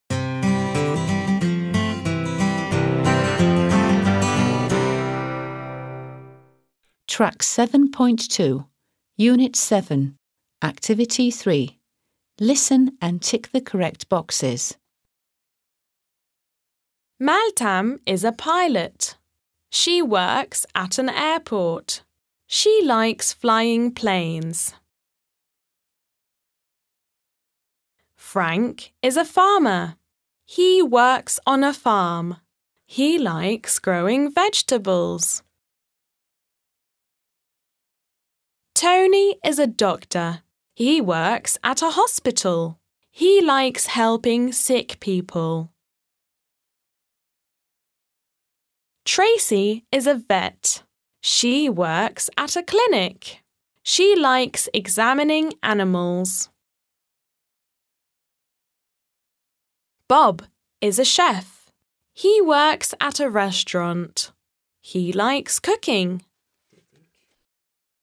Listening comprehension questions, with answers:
3. Listen and tick (√) the correct boxes.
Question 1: hospital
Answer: doctor

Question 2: airport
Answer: pilot

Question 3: farm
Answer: farmer

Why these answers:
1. Tony is a doctor. He works at a hospital. He likes helping sick people. (Tony bir doktor. Hastanede çalışıyor. Hasta insanlara yardım etmeyi seviyor.)
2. Beltam is a pilot. She works at an airport. She likes flying planes. (Beltam bir pilot. Havalimanında çalışıyor. Uçak uçurmayı seviyor.)
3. Frank is a farmer. He works on a farm. He likes growing vegetables. (Frank bir çiftçi. Çiftlikte çalışıyor. Sebze yetiştirmeyi seviyor.)

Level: 4. Sınıf